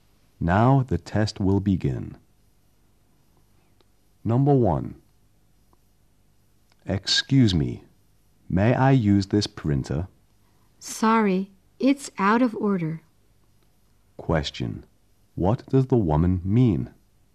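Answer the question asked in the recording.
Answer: The printer is out of order.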